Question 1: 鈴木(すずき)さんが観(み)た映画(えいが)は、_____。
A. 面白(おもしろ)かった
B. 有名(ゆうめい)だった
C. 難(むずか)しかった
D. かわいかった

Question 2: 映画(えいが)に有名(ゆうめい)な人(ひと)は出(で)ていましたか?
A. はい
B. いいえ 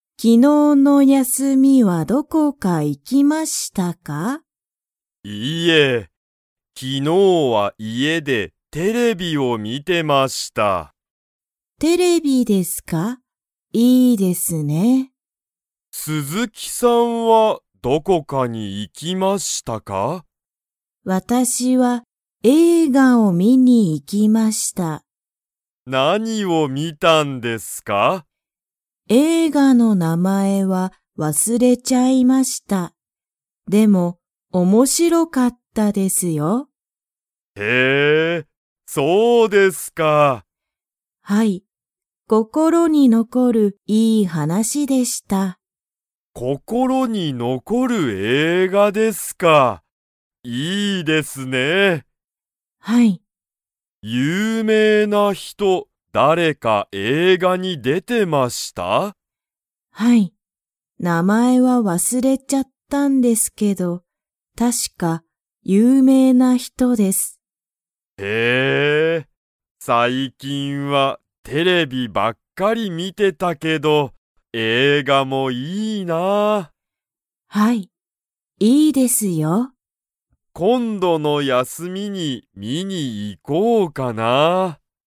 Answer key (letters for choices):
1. A
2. A

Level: Level 2